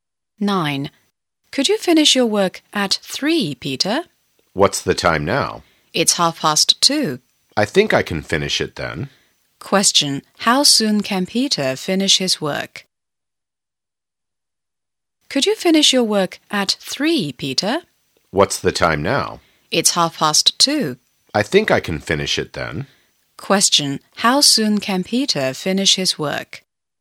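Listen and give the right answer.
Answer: In half an hour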